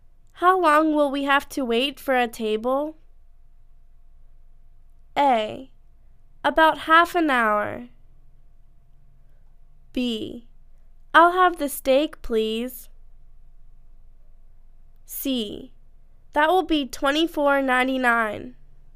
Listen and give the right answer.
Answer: About half an hour